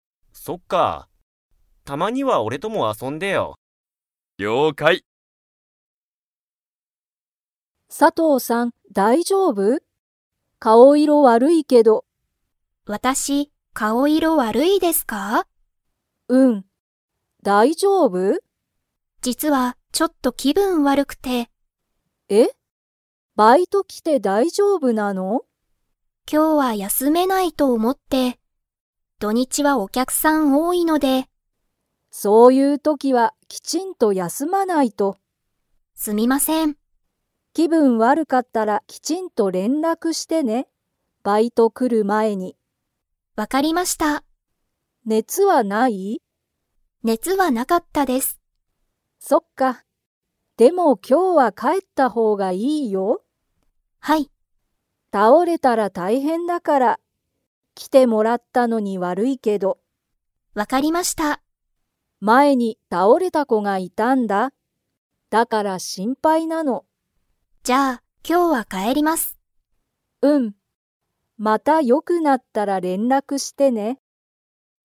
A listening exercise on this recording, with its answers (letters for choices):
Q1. 土日どにちは、 が多おおい。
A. バイト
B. 元気げんき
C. お客きゃくさん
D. 連絡れんらく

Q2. 佐藤さとうさんは今日きょう、帰かえりますか?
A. はい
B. いいえ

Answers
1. C
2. A

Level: Level 4